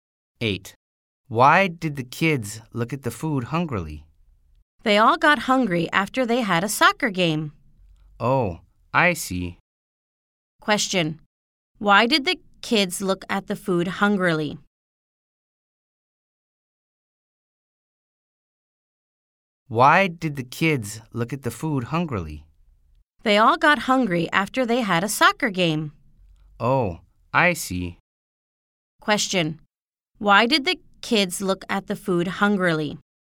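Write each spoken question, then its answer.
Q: Why did the kids look at the food hungrily?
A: They got hungry after playing a soccer game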